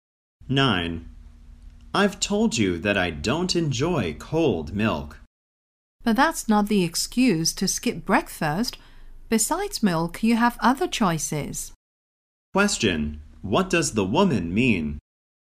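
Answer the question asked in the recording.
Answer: The man shouldn't skip breakfast; he can have something other than milk.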